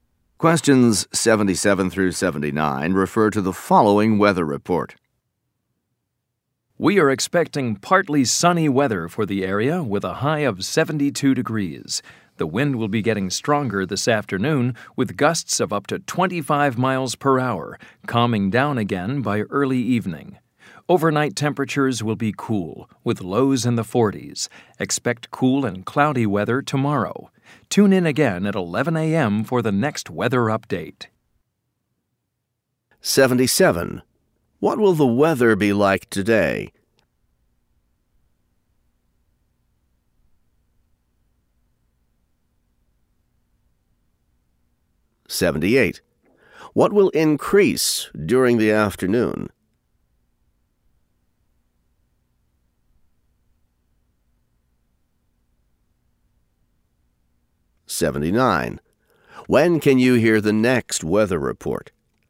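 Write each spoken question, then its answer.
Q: What will the weather be like today?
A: Partly sunny, high of 72

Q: What will increase during the afternoon?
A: The wind

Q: When can you hear the next weather report?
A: At 11 a.m.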